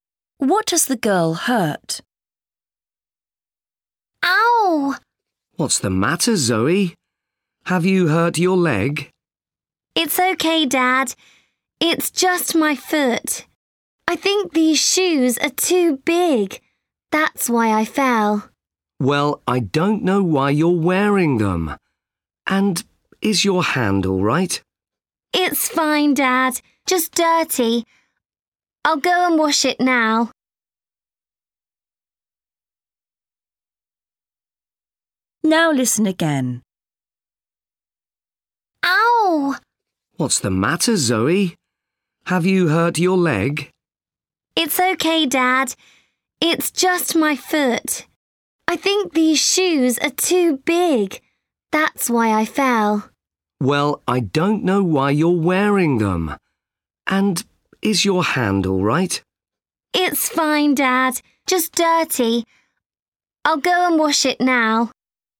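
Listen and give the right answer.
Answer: her foot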